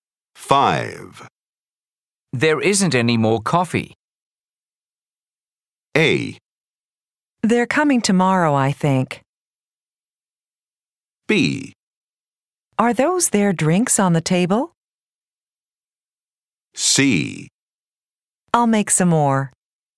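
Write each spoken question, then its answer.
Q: There isn't any more coffee.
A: C: I'll make some more.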